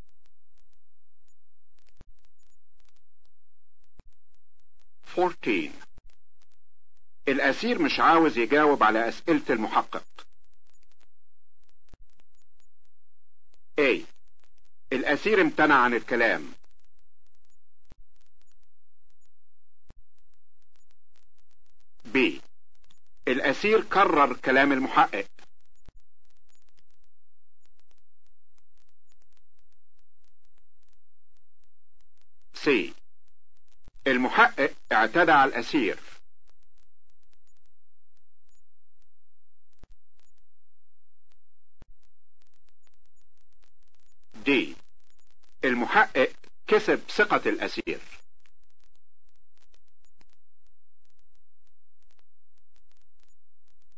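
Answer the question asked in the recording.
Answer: A: الأسير امتنع عن الكلام.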